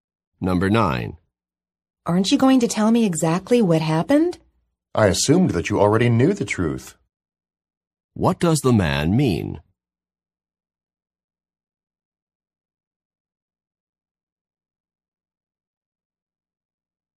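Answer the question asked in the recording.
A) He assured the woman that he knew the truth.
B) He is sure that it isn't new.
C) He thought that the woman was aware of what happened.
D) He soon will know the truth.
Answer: C) He thought that the woman was aware of what happened.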